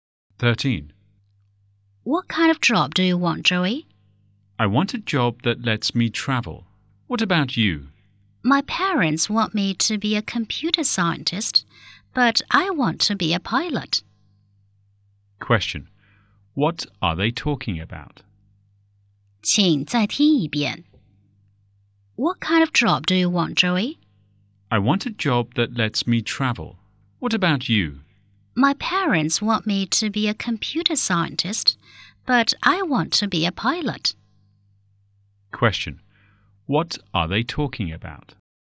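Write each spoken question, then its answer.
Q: What are they talking about?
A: The jobs they want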